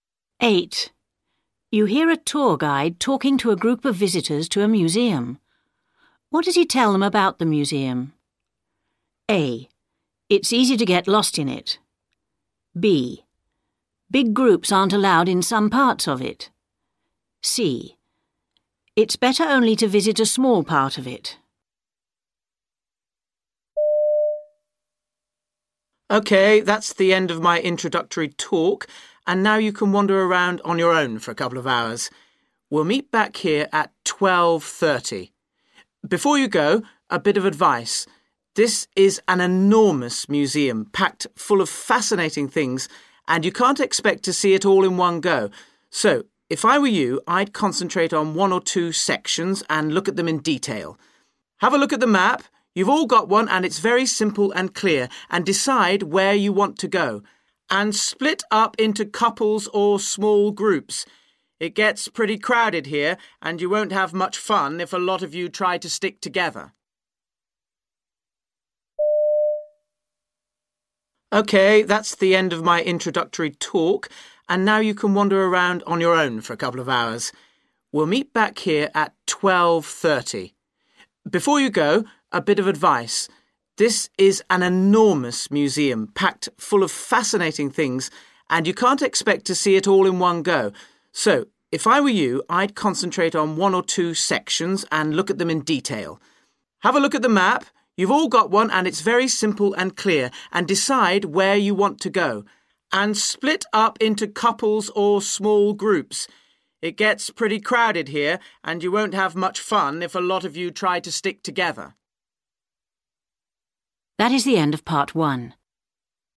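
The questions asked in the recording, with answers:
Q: What does he tell them about the museum?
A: C: It's better only to visit a small part of it.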